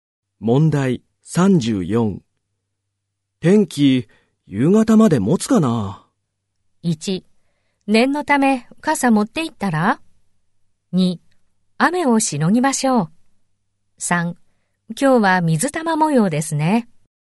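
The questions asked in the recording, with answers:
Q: 天気、夕方まで持つかな?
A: 1: 念のため傘持って行ったら?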